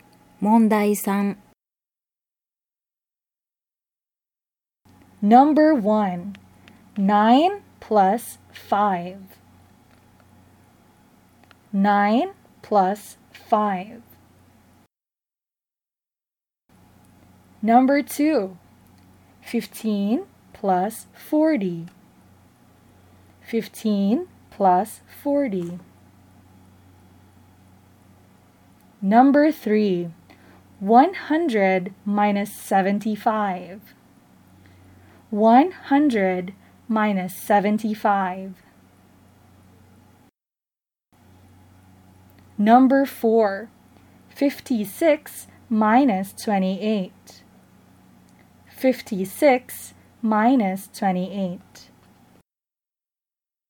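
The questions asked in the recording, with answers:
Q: 9 plus 5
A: 14

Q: 15 plus 40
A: 55

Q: 100 minus 75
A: 25

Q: 56 minus 28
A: 28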